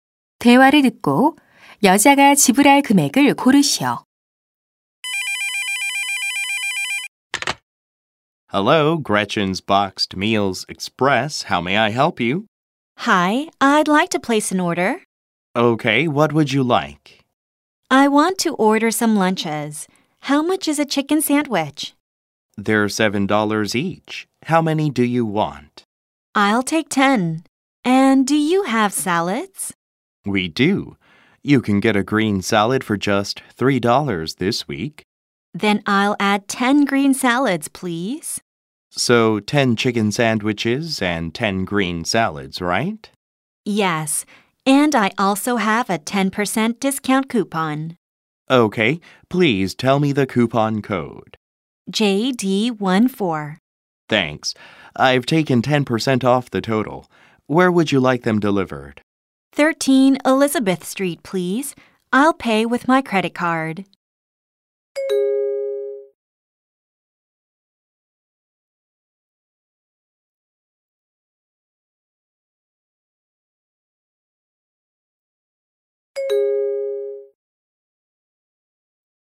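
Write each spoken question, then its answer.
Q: 대화를 듣고 여자가 지불할 금액을 고르시오.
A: 90달러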